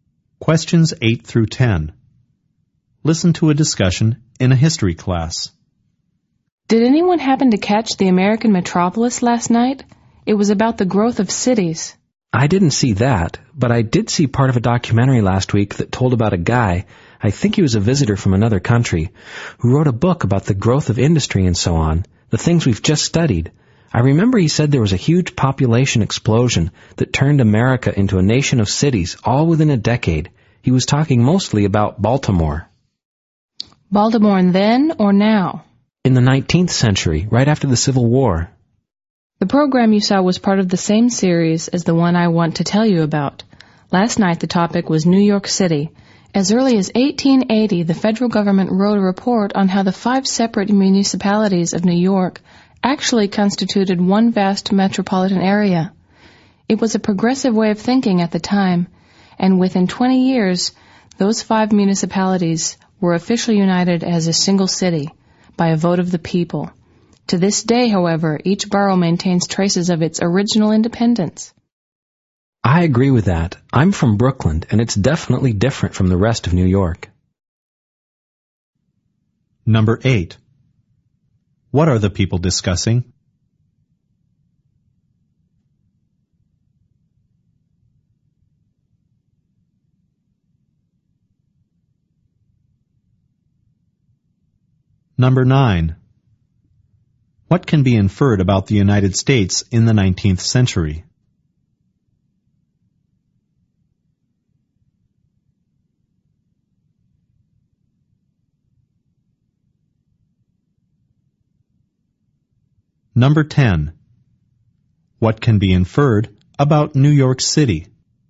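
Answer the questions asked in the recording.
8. Television documentaries about the growth of American cities.
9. Its city populations grew very quickly after the Civil War.
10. It was formed from five municipalities, which still keep traces of their independence.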